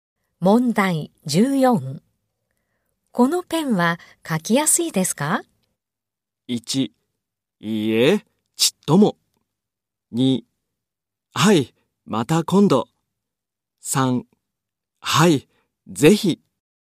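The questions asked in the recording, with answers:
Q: このペンは書きやすいですか?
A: 1: いいえ、ちっとも。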